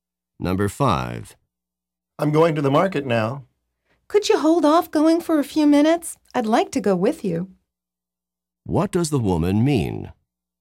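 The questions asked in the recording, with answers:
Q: What does the woman mean?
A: She wants the man to wait a few minutes so she can go with him.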